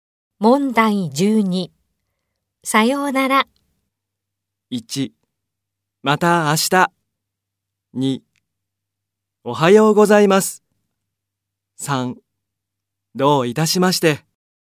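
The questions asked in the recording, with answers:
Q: さようなら。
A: 1: また明日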